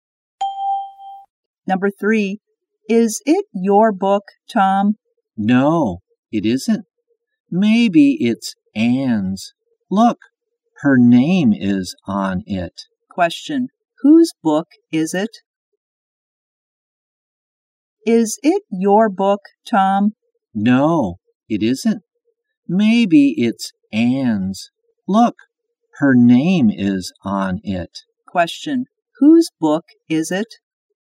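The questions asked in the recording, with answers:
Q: Whose book is it?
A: Anne's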